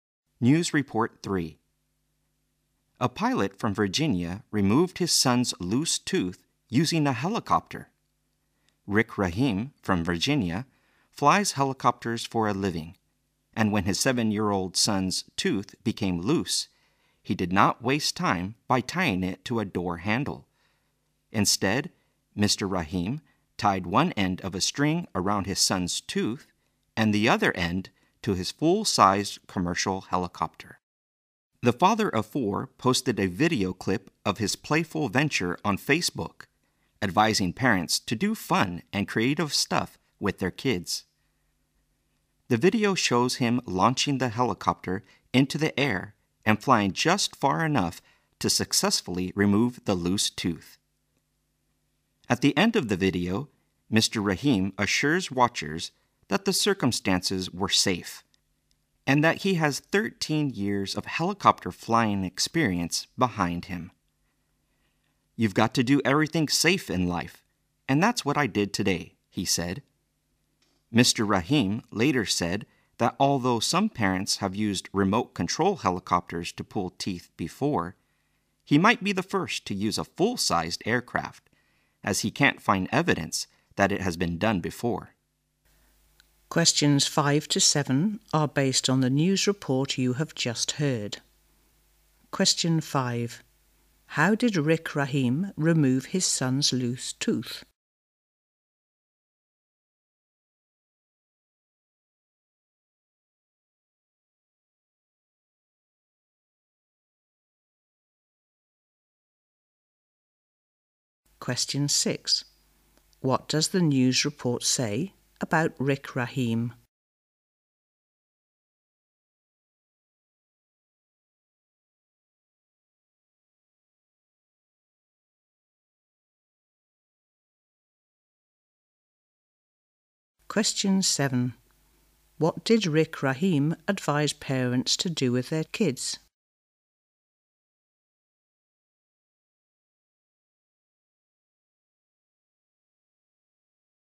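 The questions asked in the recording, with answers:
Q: How did Rick Rahim remove his son's loose tooth?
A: He tied it with a string to his helicopter and flew it

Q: What did Rick Rahim advise parents to do with their kids?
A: Do fun and creative stuff with them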